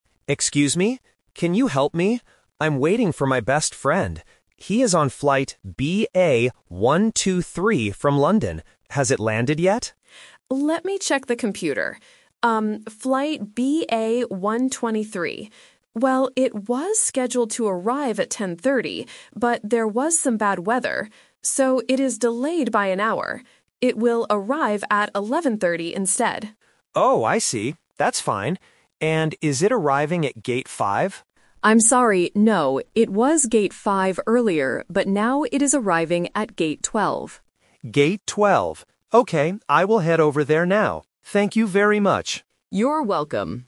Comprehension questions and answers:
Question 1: Who is the man waiting for at the airport?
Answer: His best friend.

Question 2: What time will the flight arrive?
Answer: 11:30

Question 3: Where should the man go to meet his friend?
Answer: Gate 12.

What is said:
Man: Excuse me. Can you help me? I'm waiting for my best friend. He is on flight BA 123 from London. Has it landed yet?
Information Agent: Let me check the computer. Well, it was scheduled to arrive at 10:30, but there was some bad weather. So, it is delayed by an hour. It will arrive at 11:30 instead.
Man: Oh, I see. That's fine. And is it arriving at Gate 5?
Information Agent: I'm sorry, no. It was Gate 5 earlier, but now it is arriving at Gate 12.
Man: Gate 12. Okay, I will head over there now. Thank you very much!